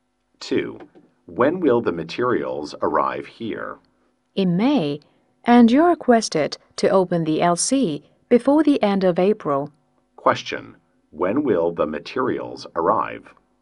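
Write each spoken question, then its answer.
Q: When will the materials arrive?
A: In May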